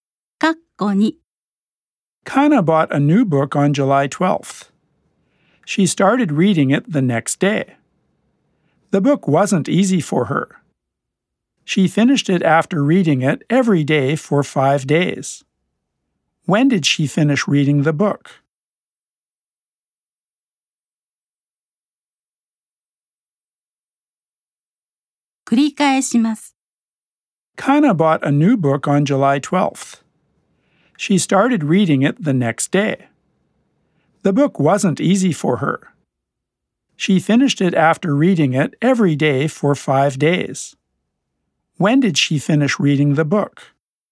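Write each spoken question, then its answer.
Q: When did she finish reading the book?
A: July 17th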